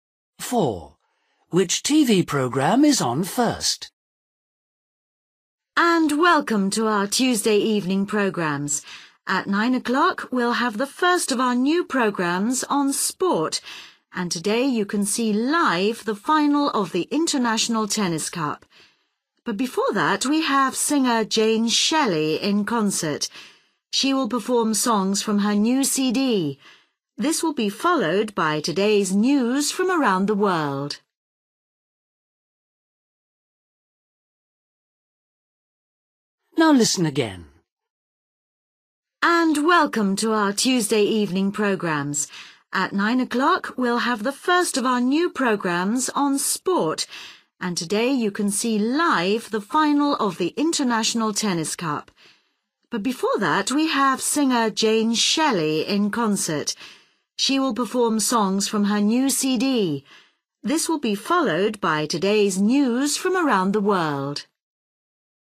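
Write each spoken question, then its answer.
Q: Which TV programme is on first?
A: Jane Shelley in concert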